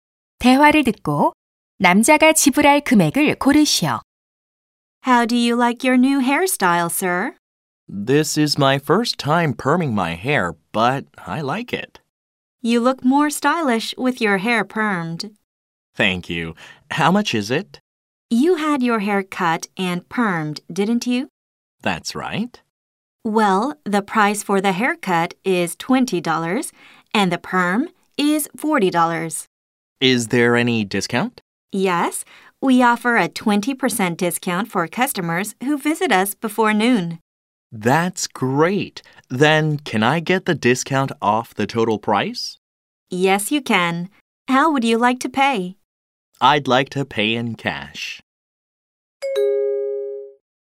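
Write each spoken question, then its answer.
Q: 대화를 듣고 남자가 지불할 금액을 고르시오.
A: 48달러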